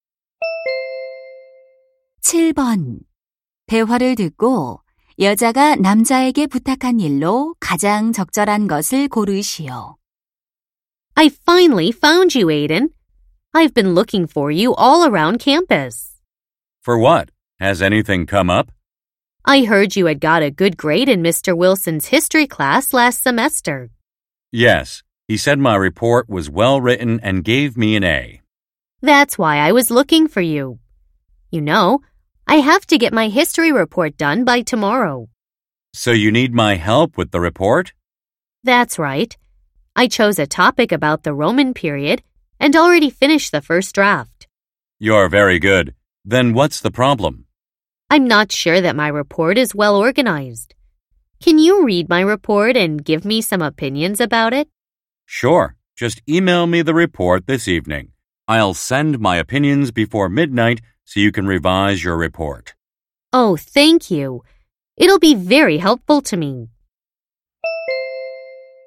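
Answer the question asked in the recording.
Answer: 역사 보고서를 읽고 의견 주기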